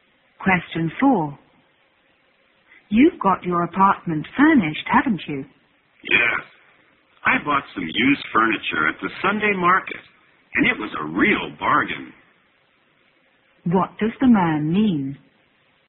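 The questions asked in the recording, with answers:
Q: What does the man mean?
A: He furnished his apartment cheaply with used furniture from the Sunday market.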